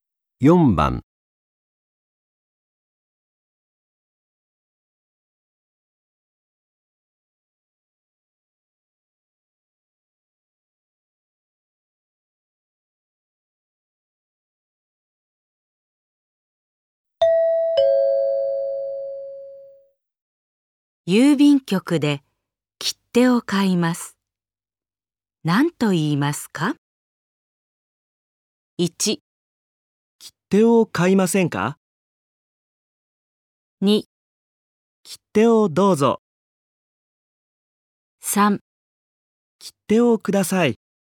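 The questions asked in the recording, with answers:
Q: 郵便局で切手を買います。何と言いますか?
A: 3: 切手をください。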